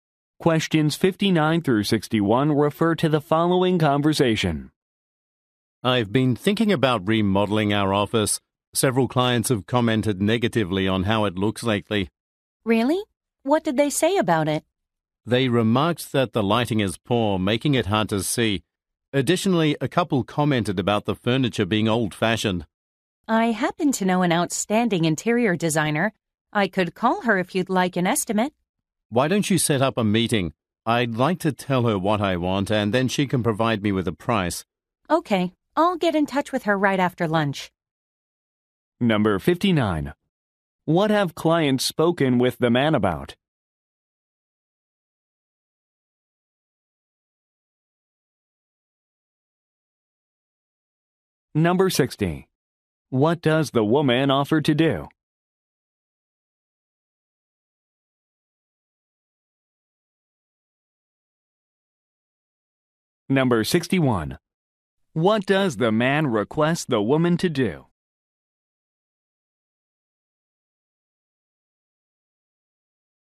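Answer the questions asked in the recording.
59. The office's appearance (poor lighting, old furniture)
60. Call an interior designer for an estimate
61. Set up a meeting with the designer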